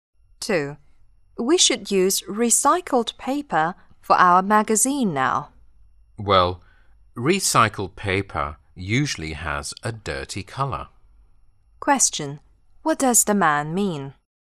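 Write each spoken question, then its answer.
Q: What does the man mean?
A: He doesn't think they should use recycled paper because it usually has a dirty color.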